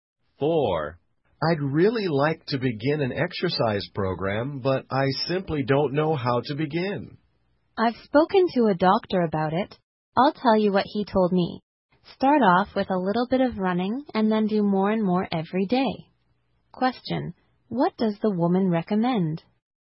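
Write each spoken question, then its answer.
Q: What does the woman recommend?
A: Start with a little running and do more every day.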